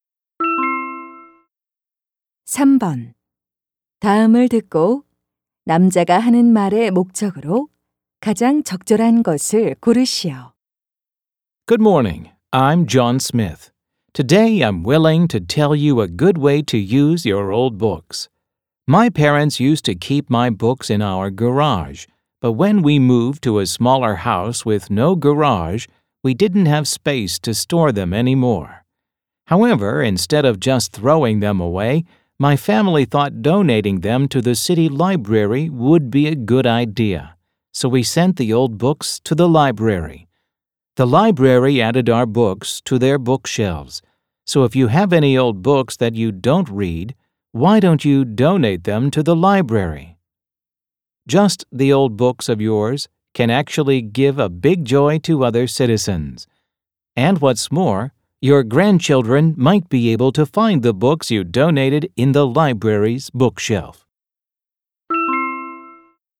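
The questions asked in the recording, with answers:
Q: 다음을 듣고 남자가 하는 말의 목적으로 가장 적절한 것을 고르시오.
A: 안 읽는 오래된 책을 도서관에 기증하도록 권장하려고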